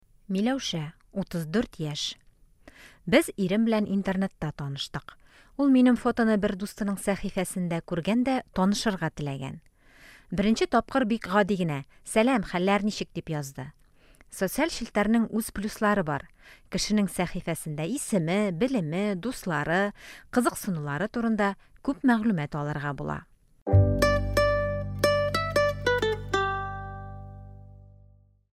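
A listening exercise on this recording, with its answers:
Бирем. Ответьте на вопросы по тексту.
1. Миләүшәнең ире булачак хатынын беренче тапкыр кайда күргән?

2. Социаль челтәрләрнең нинди уңай ягы бар?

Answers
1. Интернетта, бер дустының сәхифәсендә (фотосын күргән)
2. Кешенең сәхифәсендә исеме, белеме, дуслары, кызыксынулары турында күп мәгълүмат алырга була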